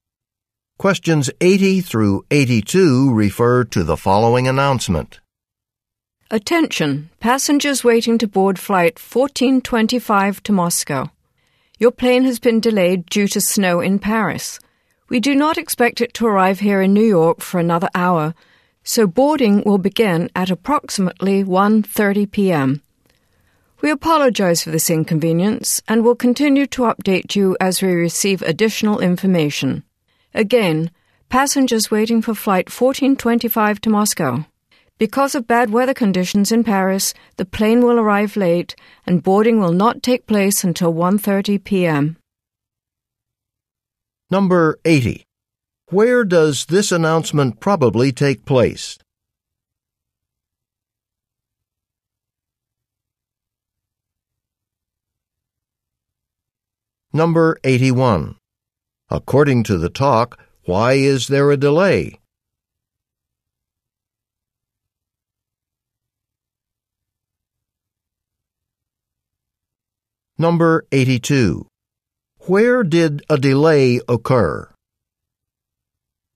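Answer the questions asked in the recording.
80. At an airport in New York
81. Bad weather (snow)
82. In Paris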